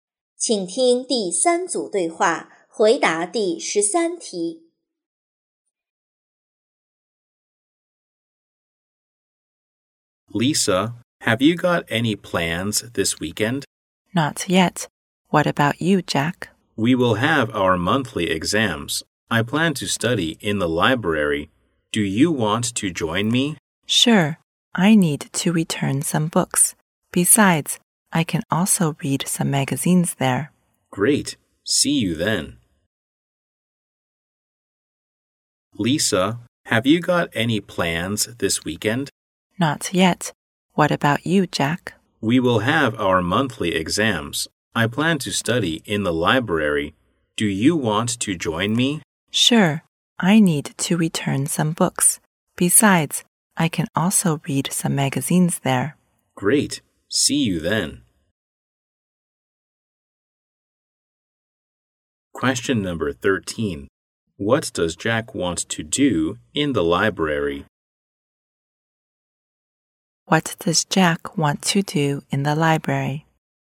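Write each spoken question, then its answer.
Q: What does Jack want to do in the library?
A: Study for the monthly exams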